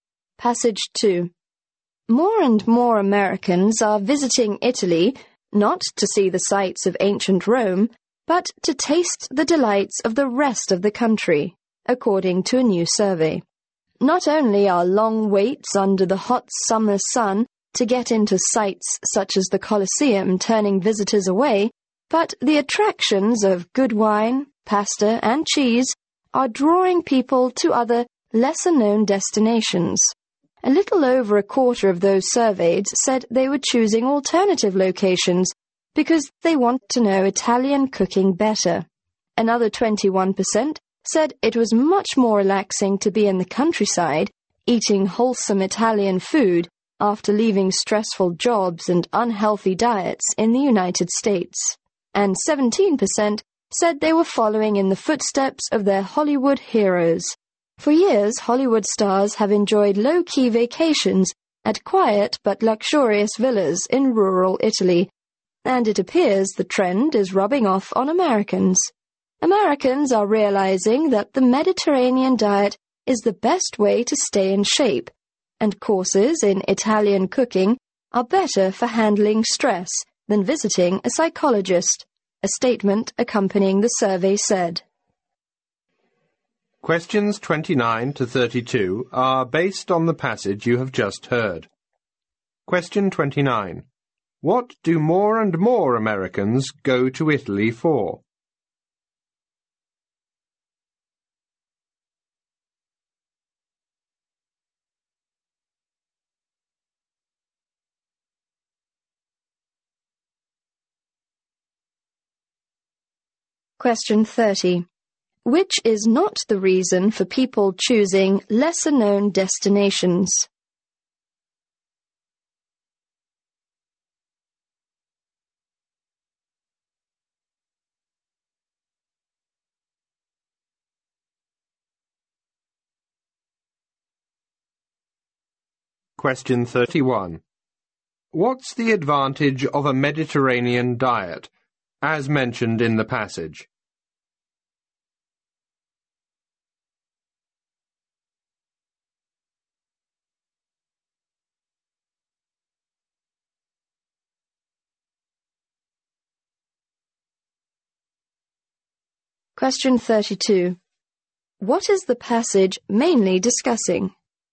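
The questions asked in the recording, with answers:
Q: What do more and more Americans go to Italy for?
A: To enjoy Italian food and the countryside rather than the sights of ancient Rome.

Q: What's the advantage of a Mediterranean diet, as mentioned in the passage?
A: It's the best way to stay in shape.

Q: What is the passage mainly discussing?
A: Americans' new trend of visiting lesser-known parts of Italy for food and relaxation.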